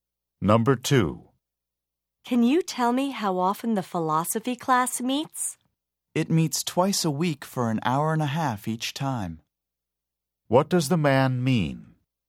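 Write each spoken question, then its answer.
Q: What does the man mean?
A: The class meets twice a week for 90 minutes each time.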